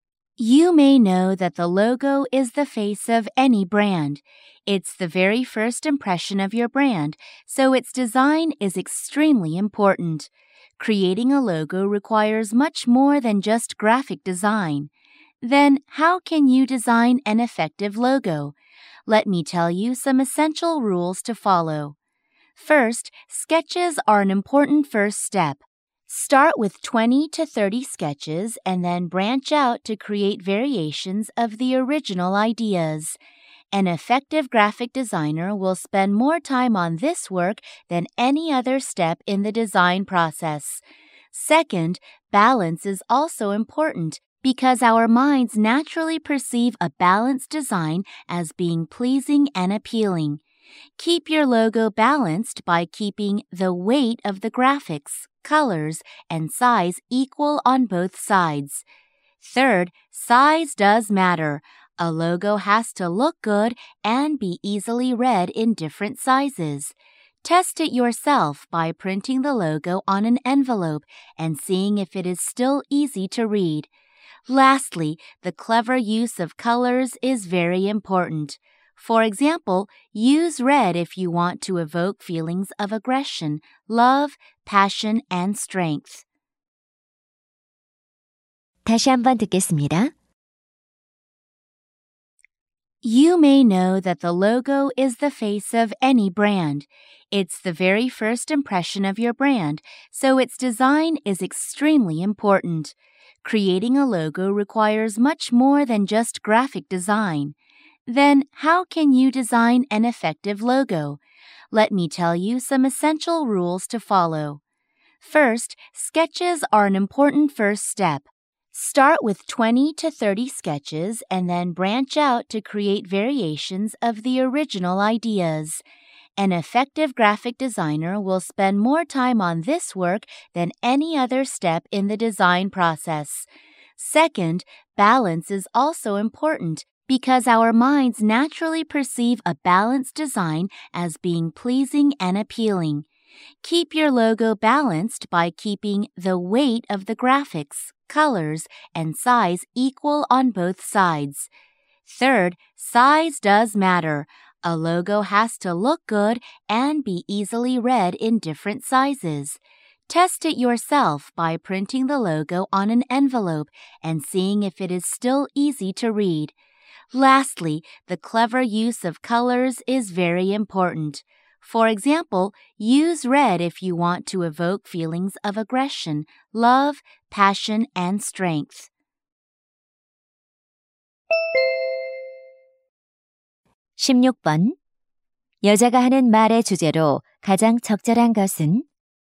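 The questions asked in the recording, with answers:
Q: 여자가 하는 말의 주제로 가장 적절한 것은?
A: 효과적인 로고 디자인을 위한 필수 규칙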